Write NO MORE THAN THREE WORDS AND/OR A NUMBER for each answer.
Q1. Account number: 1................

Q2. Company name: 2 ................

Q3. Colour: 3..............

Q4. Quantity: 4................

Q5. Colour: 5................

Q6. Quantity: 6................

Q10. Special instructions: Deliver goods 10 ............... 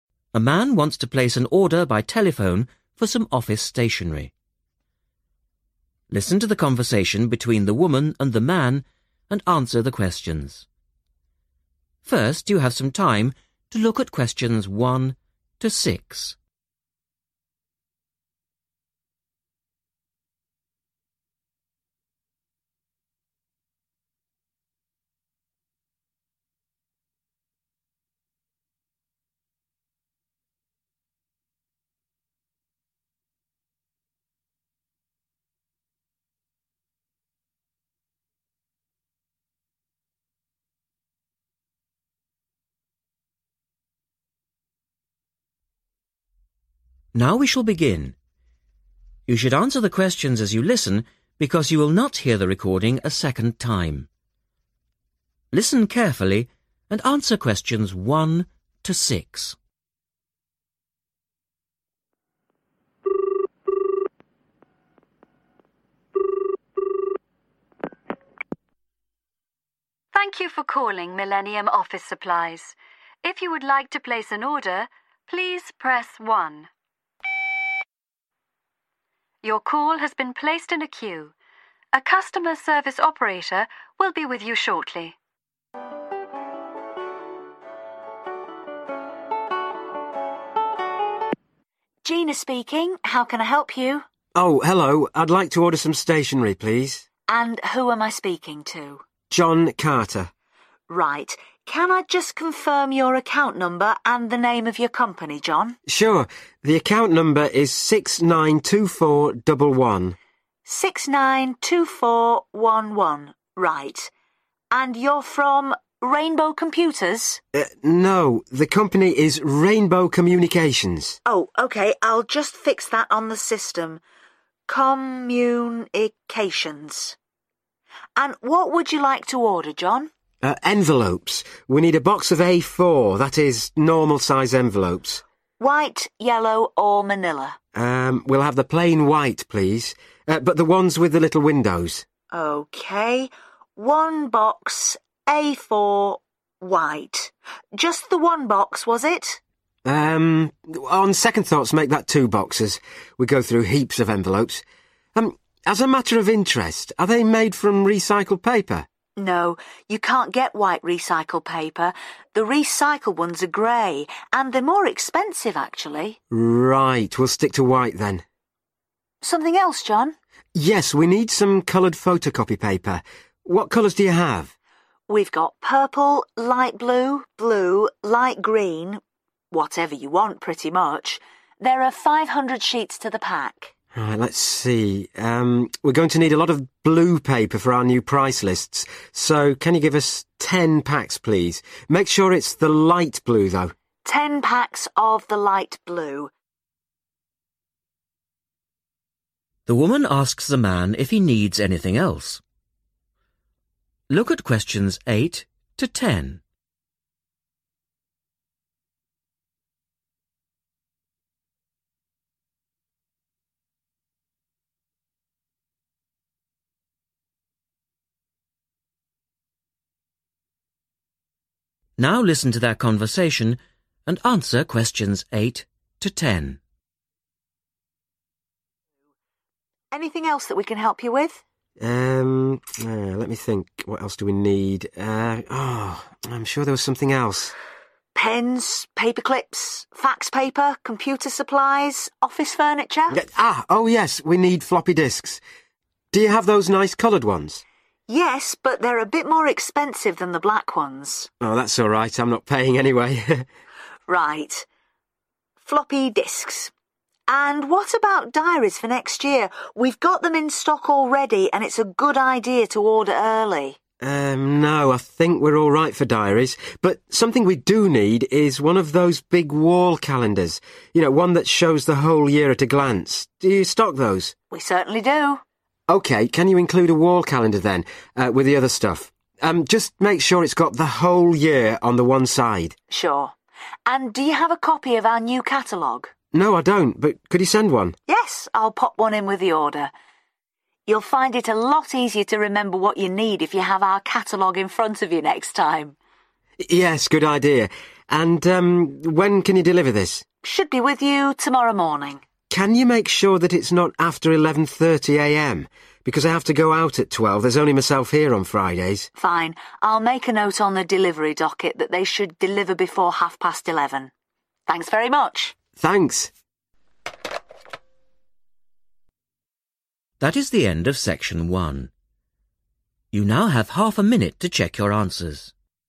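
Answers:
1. 692411
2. Rainbow Communications
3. white
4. 2 boxes
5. light blue
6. 10 packs
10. before 11:30 a.m.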